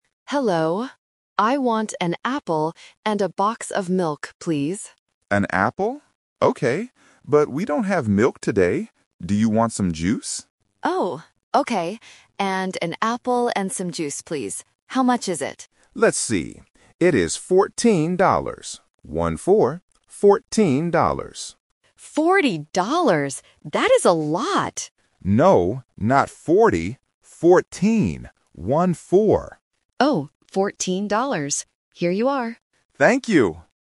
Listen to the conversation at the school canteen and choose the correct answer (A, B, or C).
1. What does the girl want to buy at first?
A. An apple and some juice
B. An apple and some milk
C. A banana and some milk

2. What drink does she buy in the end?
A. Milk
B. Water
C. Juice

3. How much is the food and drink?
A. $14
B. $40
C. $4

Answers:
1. B. An apple and some milk
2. C. Juice
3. A. $14

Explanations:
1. The girl says at the beginning: "I want an apple and a box of milk, please." Option (A) is the trap because that is what she buys later. Option (C) is not mentioned.
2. The staff member says they don't have milk and suggests juice ("Do you want some juice?"). The girl agrees. Option (A) is the trap because she wanted it but couldn't get it.
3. The man says the price is "fourteen dollars" and clarifies by saying "One-four." Option (B) is a very common A1 phonetic trap; the girl misunderstands it as "forty" but the man corrects her ("No, not forty. Fourteen.").

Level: A1

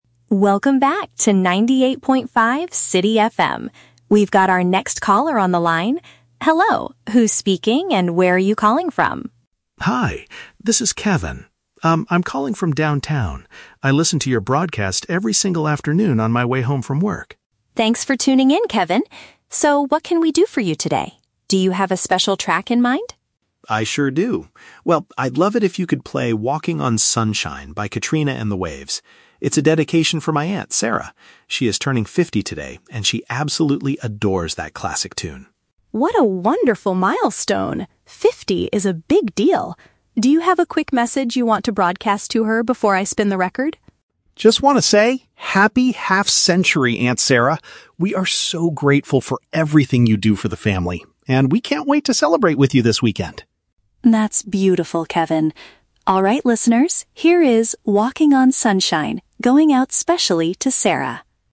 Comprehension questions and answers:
Listen to a phone conversation on a radio show. Choose the correct answer (A, B, or C) for each question.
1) Why is the man calling the radio station?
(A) To ask the host to play a specific piece of music for a family member.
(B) To complain about the songs played during his afternoon commute.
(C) To win a pair of concert tickets by answering a daily trivia question.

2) What do we learn about Kevin's aunt from the conversation?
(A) She usually listens to the radio program while driving home.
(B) She is reaching a significant age milestone today.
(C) She recently moved to a new house in the downtown area.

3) What does the radio host invite Kevin to do before playing the song?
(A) Sing a few lines of his aunt's favorite classic tune.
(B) Share a brief public greeting for his relative.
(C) Guess the name of the next track the station will play.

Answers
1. (A) To ask the host to play a specific piece of music for a family member.
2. (B) She is reaching a significant age milestone today.
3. (B) Share a brief public greeting for his relative.

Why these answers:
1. Kevin asks the host to "play 'Walking on Sunshine'" (a specific piece of music) as a dedication for his "aunt" (a family member). Option B is the Trap: The audio mentions "afternoon" and his "way home from work" (commute), but he says he listens every day; he is not complaining. Option C is a plausible radio activity, but it is not mentioned.
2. Kevin says his aunt is "turning fifty today" and says "Happy half-century". Option B paraphrases this fact. Option A is the Trap: Listening to the radio on the way home is what Kevin does, not his aunt. Option C is also a Trap: Kevin is calling from "downtown", but the aunt did not move there.
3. The host asks if Kevin has a "quick message you want to broadcast to her". Option B uses synonyms to express this (brief = quick; public greeting = message to broadcast; relative = her/aunt). Option A is the Trap: "Classic tune" is mentioned in the audio, but the host doesn't ask Kevin to sing it. Option C is not mentioned.

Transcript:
Radio Host: Welcome back to 98.5 City FM. We've got our next caller on the line. Hello, who's speaking and where are you calling from?
Kevin: Hi! This is Kevin. Um, I'm calling from downtown. I listen to your broadcast every single afternoon on my way home from work.
Radio Host: Thanks for tuning in, Kevin! So, what can we do for you today? Do you have a special track in mind?
Kevin: I sure do. Well, I'd love it if you could play "Walking on Sunshine" by Katrina and the Waves. It's a dedication for my aunt, Sarah. She is turning fifty today, and she absolutely adores that classic tune.
Radio Host: What a wonderful milestone! Fifty is a big deal. Do you have a quick message you want to broadcast to her before I spin the record?
Kevin: Just want to say: Happy half-century, Aunt Sarah! We are so grateful for everything you do for the family, and we can't wait to celebrate with you this weekend.
Radio Host: That's beautiful, Kevin. Alright listeners, here is "Walking on Sunshine", going out specially to Sarah.

